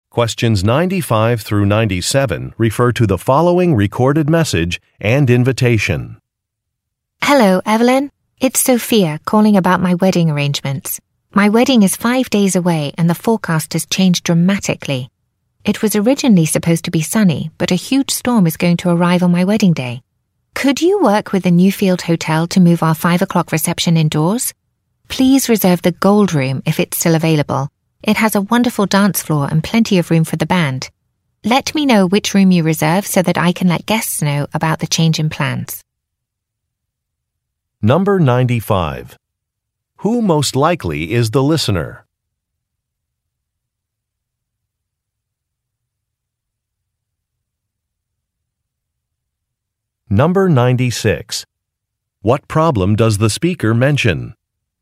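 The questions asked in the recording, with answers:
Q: What problem does the speaker mention?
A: A storm is expected on the wedding day (bad weather)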